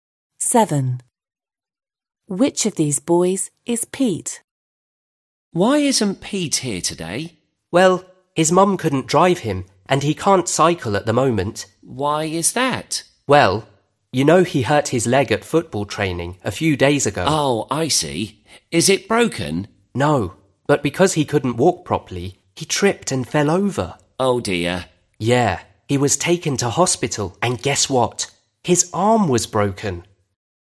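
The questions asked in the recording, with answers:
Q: Which of these boys is Pete?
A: The boy with a broken arm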